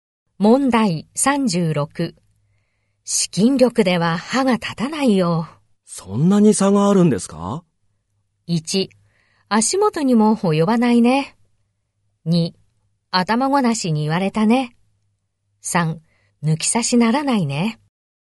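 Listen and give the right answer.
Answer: 1: 足元にも及ばないね。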